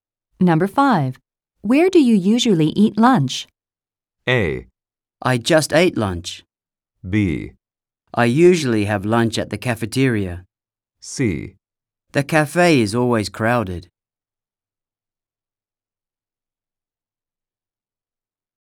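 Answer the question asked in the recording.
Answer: B: I usually have lunch at the cafeteria.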